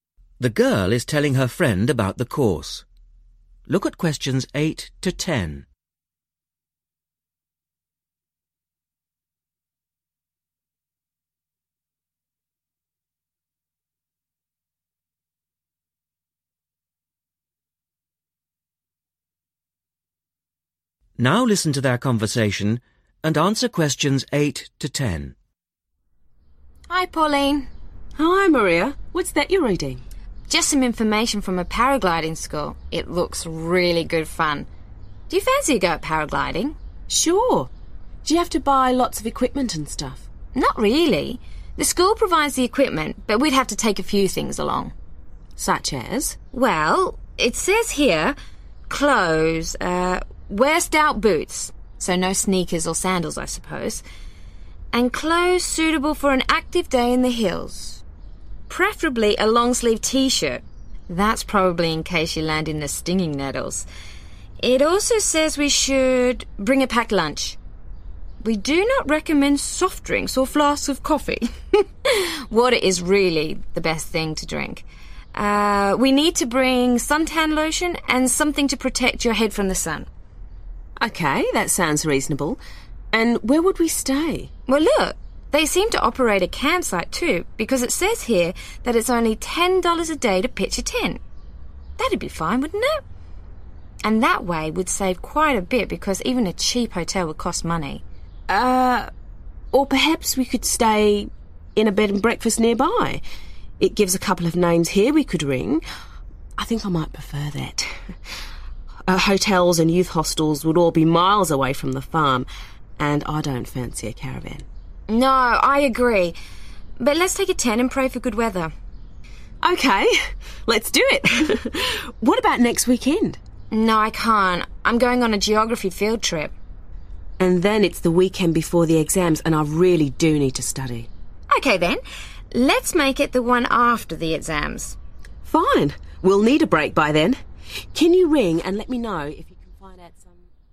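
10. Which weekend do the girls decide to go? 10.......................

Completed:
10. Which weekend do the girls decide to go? after the exams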